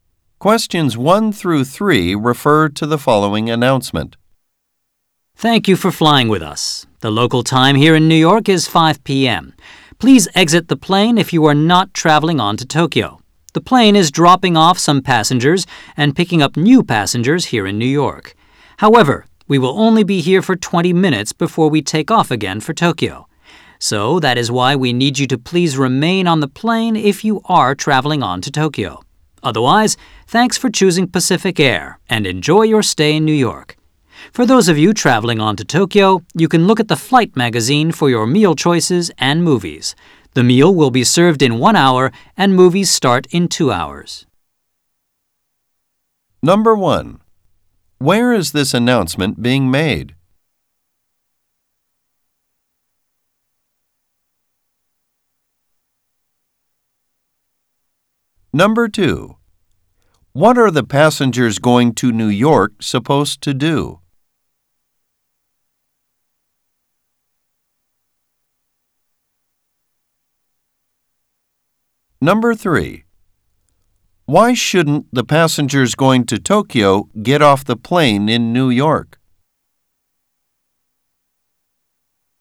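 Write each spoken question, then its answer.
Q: Where is this announcement being made?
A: On a plane (in New York)

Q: What are the passengers going to New York supposed to do?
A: Exit the plane

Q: Why shouldn't the passengers going to Tokyo get off the plane in New York?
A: The plane will only stop for 20 minutes before taking off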